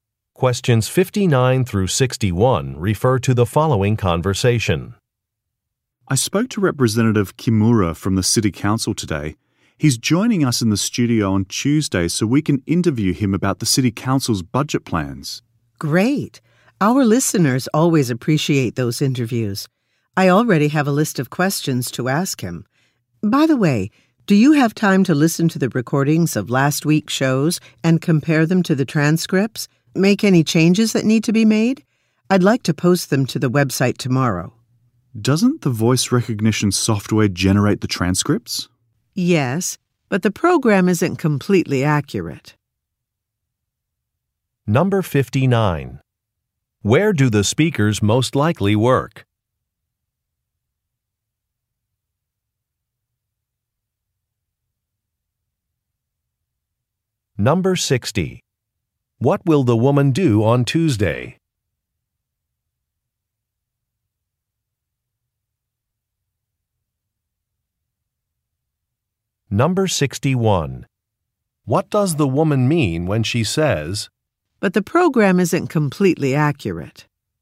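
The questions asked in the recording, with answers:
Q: Where do the speakers most likely work?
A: At a radio station

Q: What will the woman do on Tuesday?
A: Interview Representative Kimura

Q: "But the program isn't completely accurate"?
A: The transcripts need to be checked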